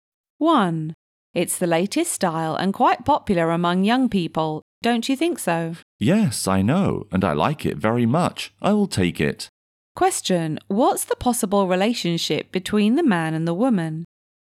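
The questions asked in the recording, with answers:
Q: Question, what's the possible relationship between the man and the woman?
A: Shop assistant and customer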